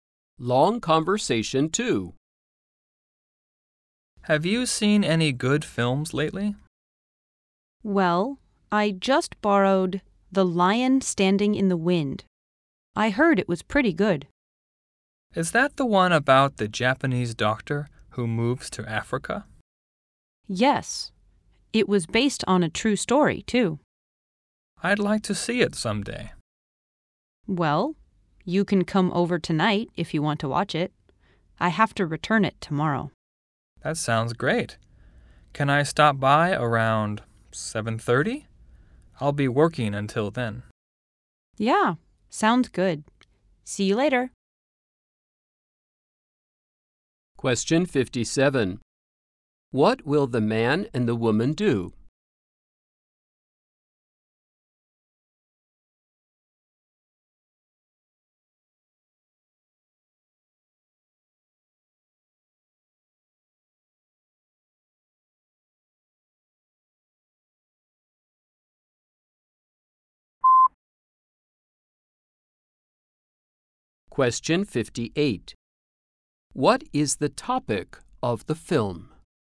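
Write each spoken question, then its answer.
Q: What will the man and the woman do?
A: Watch the film together tonight around 7:30

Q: What is the topic of the film?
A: A Japanese doctor who moves to Africa (a true story)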